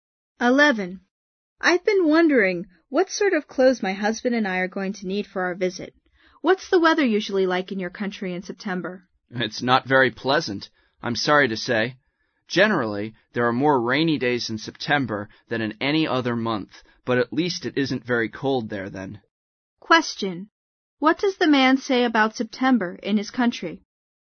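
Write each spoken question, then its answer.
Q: What does the man say about September in his country?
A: It has more rainy days than any other month, but it isn't very cold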